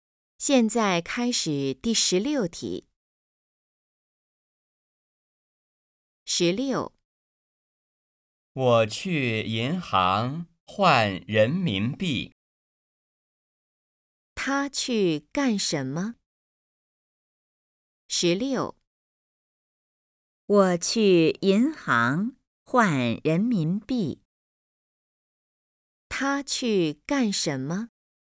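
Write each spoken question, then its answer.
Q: 他去干什么?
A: 去银行换人民币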